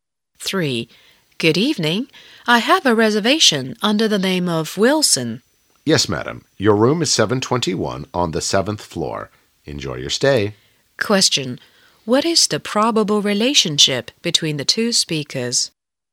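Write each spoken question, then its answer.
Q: What is the probable relationship between the two speakers?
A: Hotel clerk and guest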